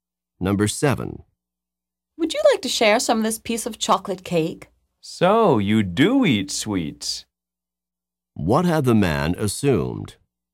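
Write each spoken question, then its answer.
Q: What had the man assumed?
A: The woman did not eat sweets.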